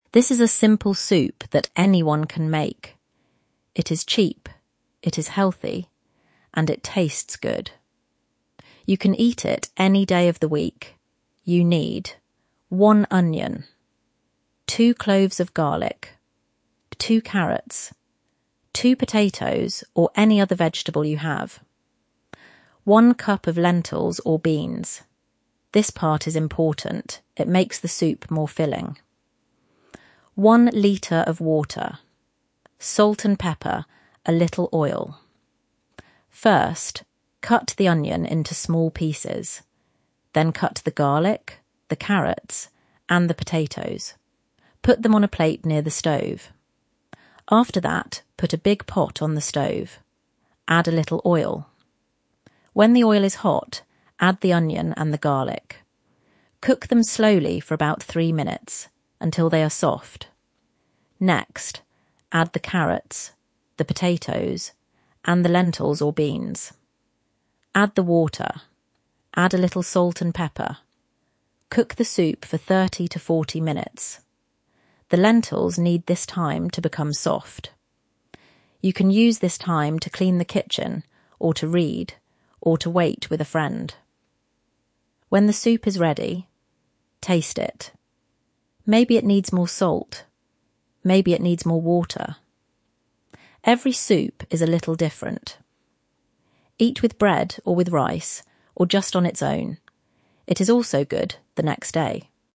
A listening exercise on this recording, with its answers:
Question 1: What two ingredients can you change?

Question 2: Why are the lentils or beans important?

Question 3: What do you cook first in the pot?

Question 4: How long does the soup cook?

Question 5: What can you do while the soup is cooking?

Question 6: Does every soup taste the same?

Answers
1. The potatoes (you can use any other vegetable you have), and the lentils or beans (you can use either one).
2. Because they make the soup more filling
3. The onion and the garlic
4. Thirty to forty minutes
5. Clean the kitchen, read, or wait with a friend.
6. No. Every soup is a little different.

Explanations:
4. the lentils need this time to become soft.

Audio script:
This is a simple soup that anyone can make. It is cheap, it is healthy, and it tastes good. You can eat it any day of the week.
You need:
1 onion
2 cloves of garlic
2 carrots
2 potatoes (or any other vegetable you have)
1 cup of lentils or beans (this part is important — it makes the soup more filling)
1 litre of water
salt and pepper
a little oil
First, cut the onion into small pieces. Then cut the garlic, the carrots, and the potatoes. Put them on a plate near the stove.
After that, put a big pot on the stove. When the oil is hot, add the onion and the garlic. Cook them slowly for about three minutes, until they are soft.
Next, add the carrots, the potatoes, and the lentils or beans. Add the water.
The lentils need this time to become soft. You can use this time to clean the kitchen, or to read, or to wait with a friend.
When the soup is ready, taste it. Maybe it needs more water. Every soup is a little different.
Eat with bread, or with rice, or just on its own. It is also good the next day.